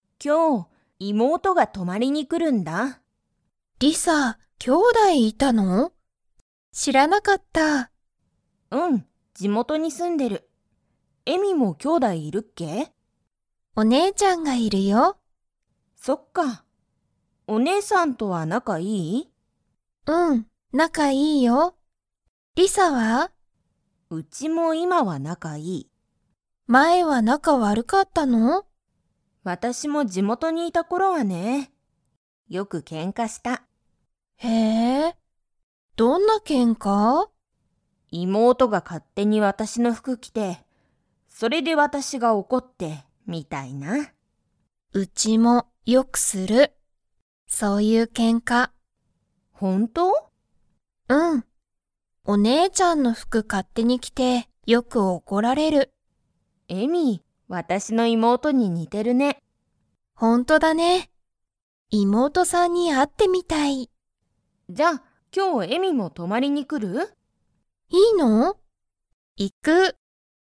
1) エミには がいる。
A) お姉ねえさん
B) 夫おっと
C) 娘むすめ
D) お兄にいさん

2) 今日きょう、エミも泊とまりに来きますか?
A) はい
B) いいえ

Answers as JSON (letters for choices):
{"1": "A", "2": "A"}

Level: Level 4